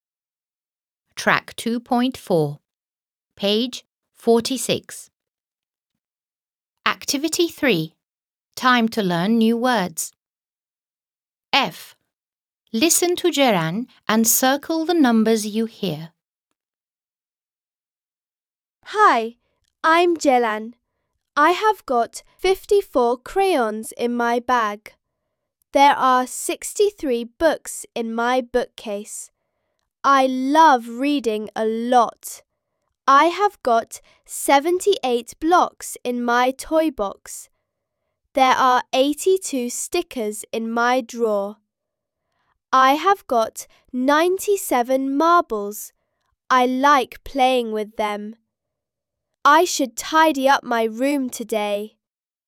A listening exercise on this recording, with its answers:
f. Listen to Ceren and circle the numbers you hear.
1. Listen to Ceren and circle the numbers you hear.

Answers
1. 54, 63, 78, 82, 97

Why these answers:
Kullanılmayan (fazladan) sayılar: 58, 100, 91 (bunlar duyulmadı)

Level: 5. Sınıf